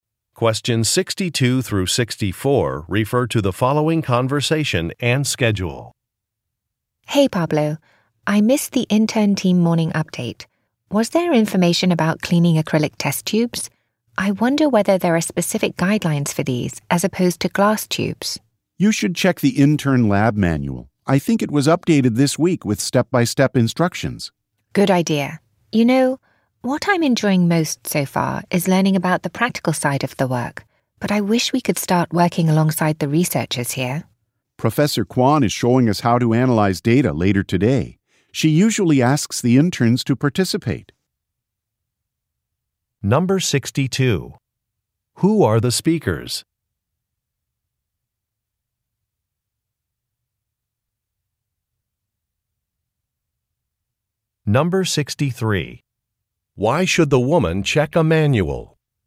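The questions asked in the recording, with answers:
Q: Who are the speakers?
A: Interns

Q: Why should the woman check a manual?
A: To find step-by-step instructions for cleaning acrylic test tubes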